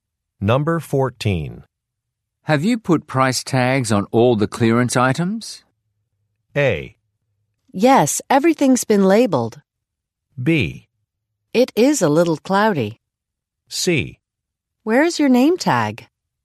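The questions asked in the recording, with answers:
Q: Have you put price tags on all the clearance items?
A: A: Yes, everything's been labeled.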